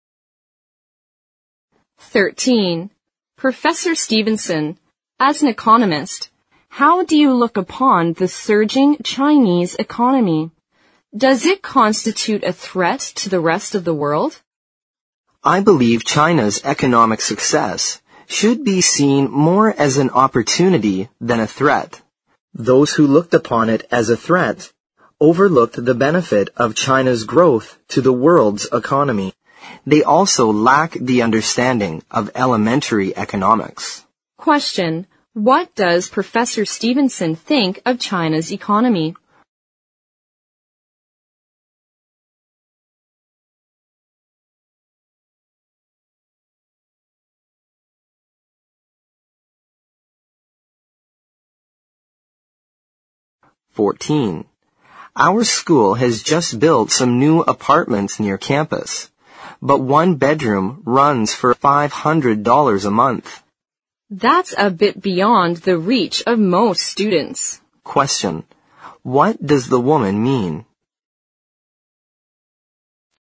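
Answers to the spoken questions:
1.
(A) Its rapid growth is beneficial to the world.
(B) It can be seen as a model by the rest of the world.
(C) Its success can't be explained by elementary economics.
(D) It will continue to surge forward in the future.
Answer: (A) Its rapid growth is beneficial to the world.
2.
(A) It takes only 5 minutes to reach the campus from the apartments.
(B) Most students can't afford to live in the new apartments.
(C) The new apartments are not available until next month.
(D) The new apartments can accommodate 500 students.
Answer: (B) Most students can't afford to live in the new apartments.

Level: 四级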